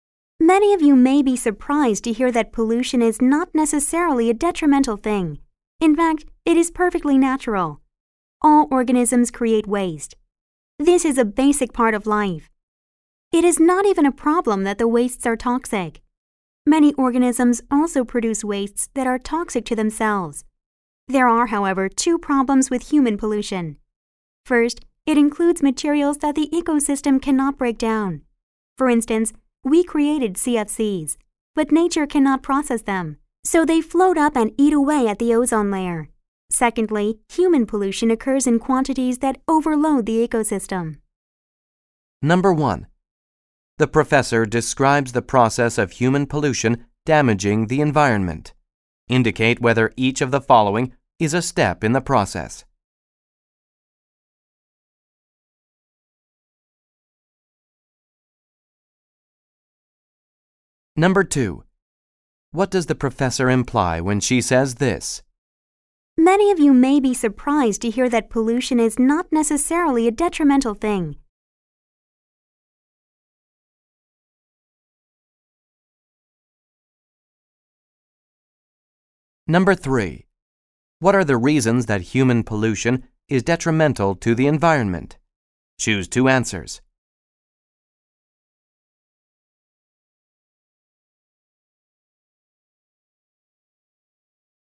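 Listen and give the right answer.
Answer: It includes materials the ecosystem cannot break down, and it occurs in quantities that overload the ecosystem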